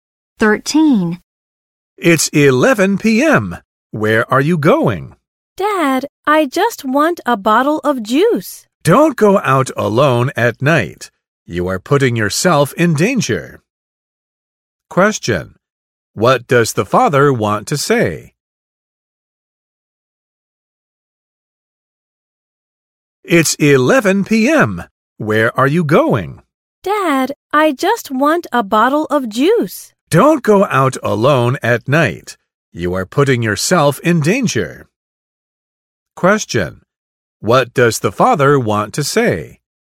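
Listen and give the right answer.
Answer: It's dangerous to go out alone at night.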